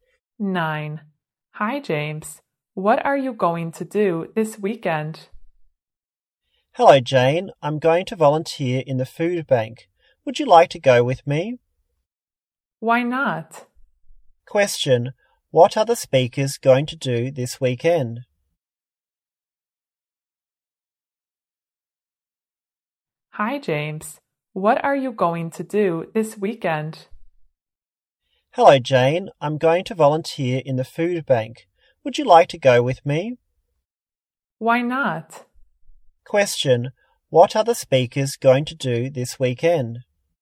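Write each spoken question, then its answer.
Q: Question. What are the speakers going to do this weekend?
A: Volunteer in the food bank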